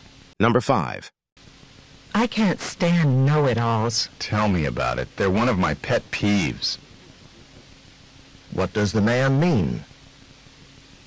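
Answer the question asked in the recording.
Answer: He also dislikes know-it-alls.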